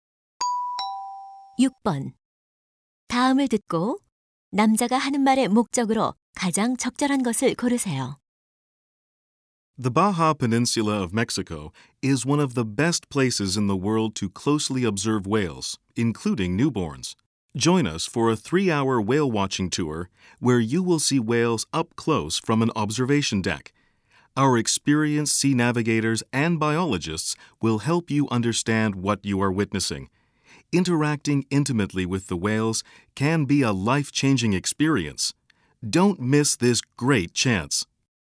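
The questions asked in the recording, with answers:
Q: 다음을 듣고 남자가 하는 말의 목적으로 가장 적절한 것을 고르세요.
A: 고래 관찰 투어 홍보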